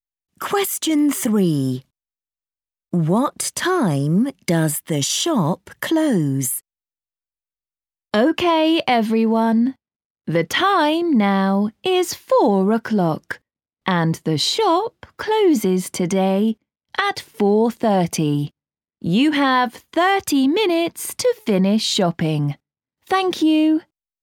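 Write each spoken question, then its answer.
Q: What time does the shop close?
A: 4:30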